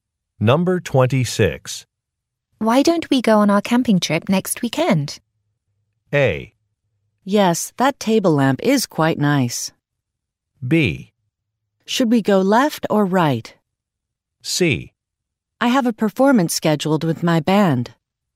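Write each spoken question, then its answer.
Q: Why don't we go on our camping trip next weekend?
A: C: I have a performance scheduled with my band.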